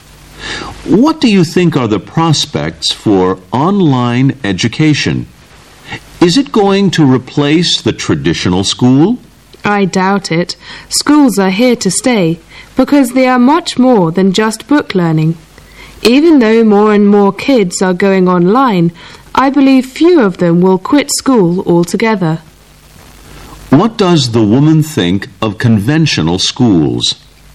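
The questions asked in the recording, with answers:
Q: What does the woman think of conventional schools?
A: Online education won't replace them; they are here to stay.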